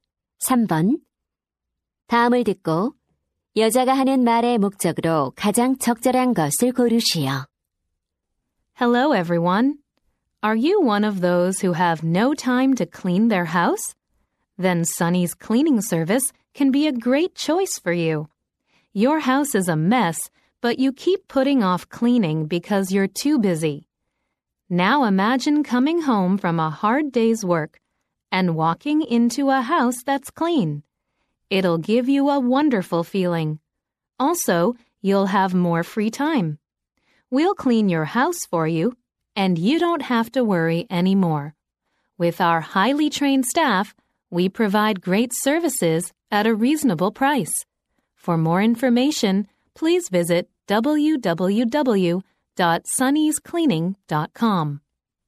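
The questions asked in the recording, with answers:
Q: 다음을 듣고 여자가 하는 말의 목적으로 가장 적절한 것을 고르시오.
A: 청소 서비스를 광고하려고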